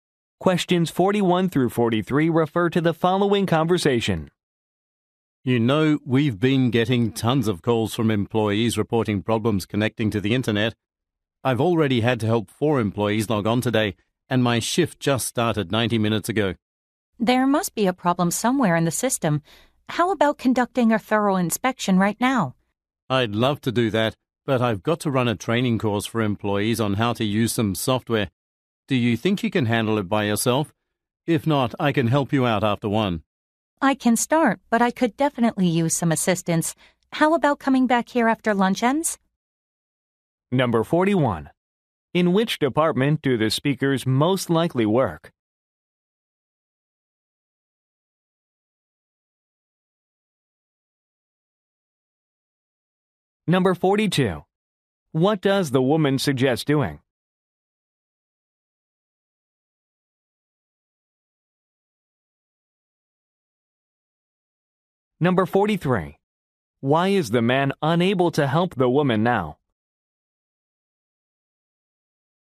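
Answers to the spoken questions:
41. IT / technical support
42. Inspecting the system right now
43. He has to run a software training course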